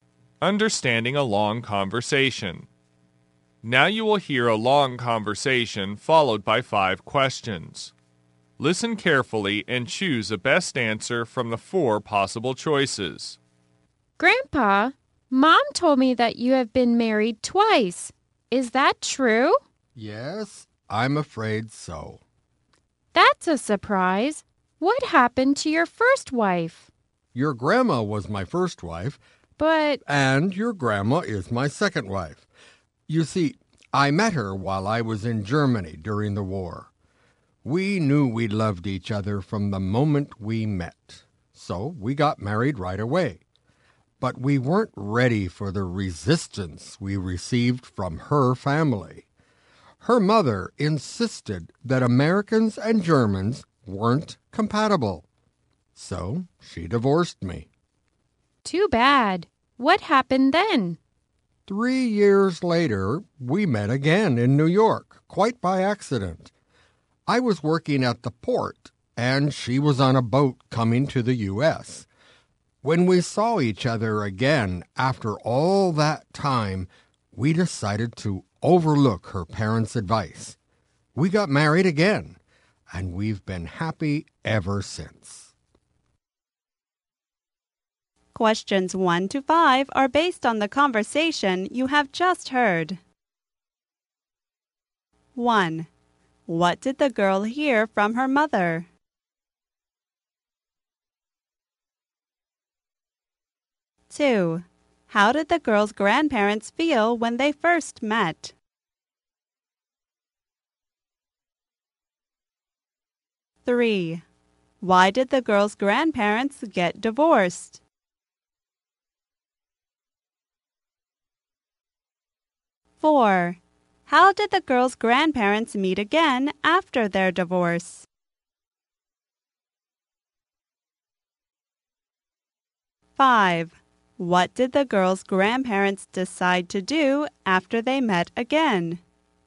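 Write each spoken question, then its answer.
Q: What did the girl hear from her mother?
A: That her grandpa had been married twice

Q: How did the girl's grandparents feel when they first met?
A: They loved each other from the moment they met

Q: Why did the girl's grandparents get divorced?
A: Her mother insisted Americans and Germans weren't compatible

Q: How did the girl's grandparents meet again after their divorce?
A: By accident in New York, at the port

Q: What did the girl's grandparents decide to do after they met again?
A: Ignore her parents' advice and marry again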